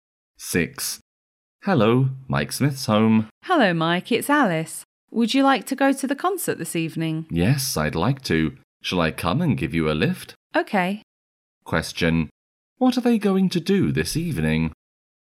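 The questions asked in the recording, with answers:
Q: What are they going to do this evening?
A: Go to a concert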